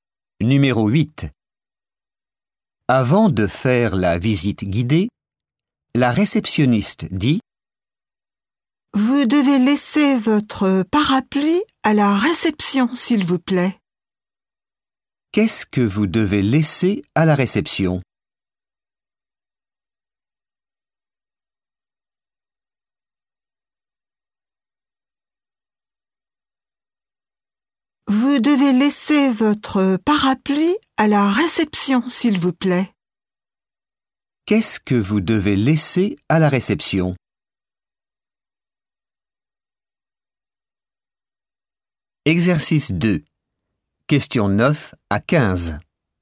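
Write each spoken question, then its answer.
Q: Qu'est-ce que vous devez laisser à la réception ?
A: votre parapluie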